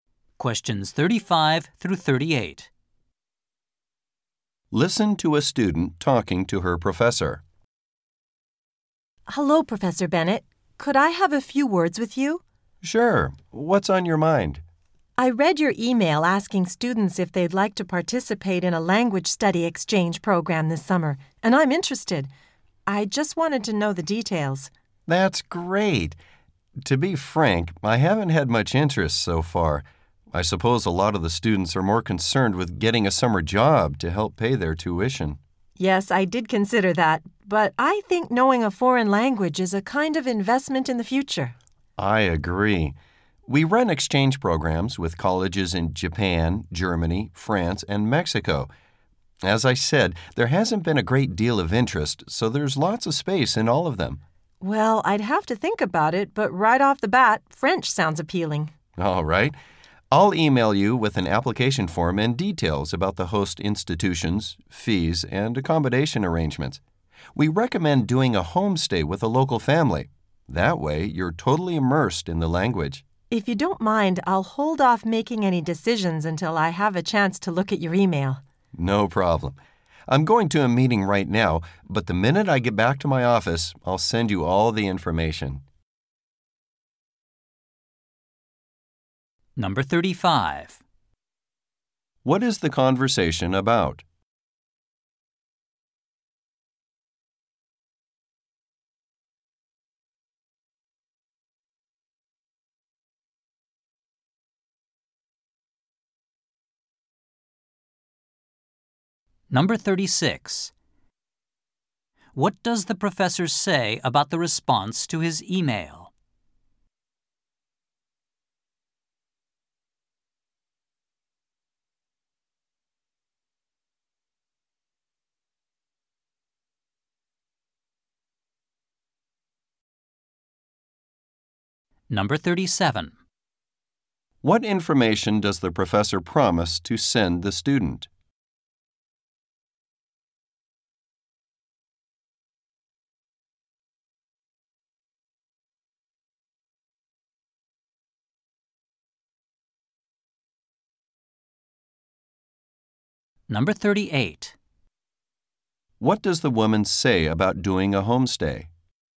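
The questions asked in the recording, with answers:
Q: What is the conversation about?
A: A summer language study exchange program

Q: What does the professor say about the response to his email?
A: Not many students have been interested

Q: What information does the professor promise to send the student?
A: An application form and details about host institutions, fees and accommodation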